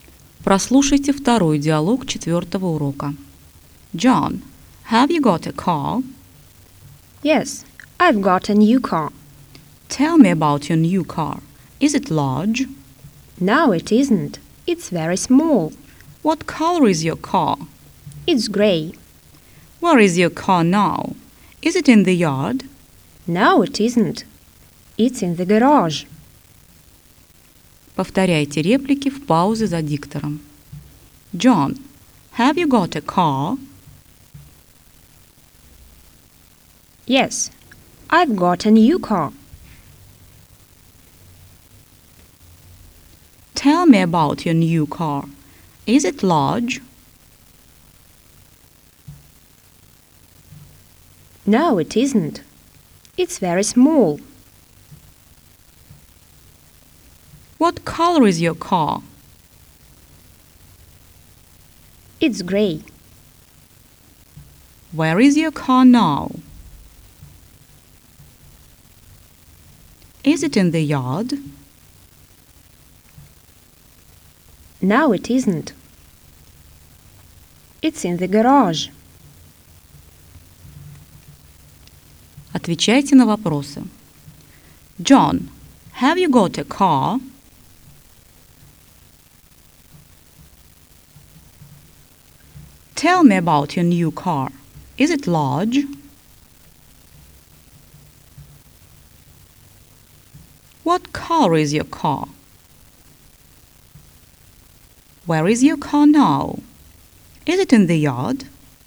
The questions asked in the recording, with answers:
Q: John, have you got a car?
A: Yes, I've got a new car.

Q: Is it large?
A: No, it isn't.

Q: What color is your car?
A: It's gray.

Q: Where is your car now? Is it in the yard?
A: No, it isn't. It's in the garage.